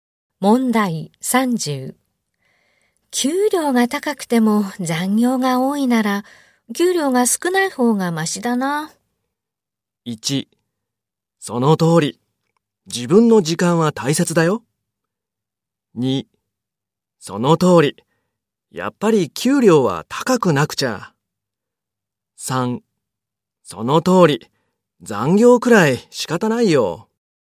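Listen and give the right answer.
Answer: 1: その通り。自分の時間は大切だよ。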